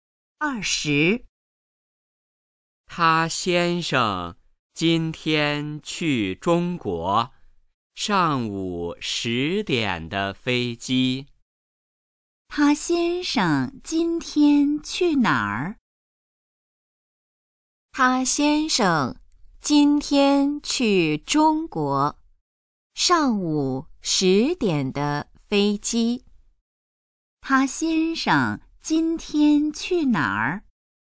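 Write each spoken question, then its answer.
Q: 他先生今天去哪儿?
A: 中国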